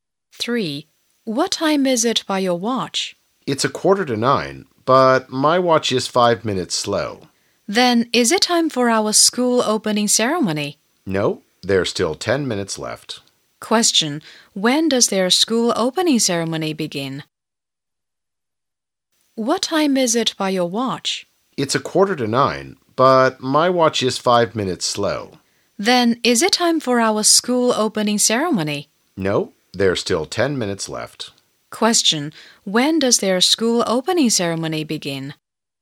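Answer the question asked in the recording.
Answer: At 9:00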